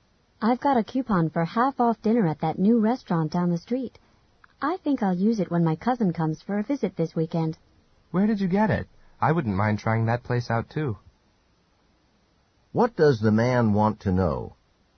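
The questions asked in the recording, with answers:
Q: What does the man want to know?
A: Where the woman got the coupon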